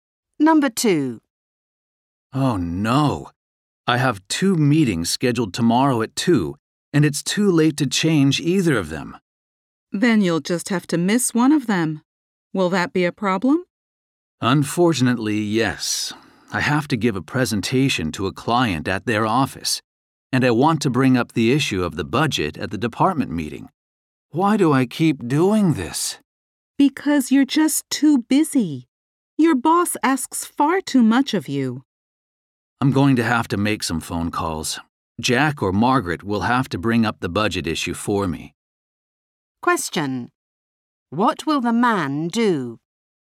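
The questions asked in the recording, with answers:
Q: What will the man do?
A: Make phone calls to get Jack or Margaret to raise the budget issue for him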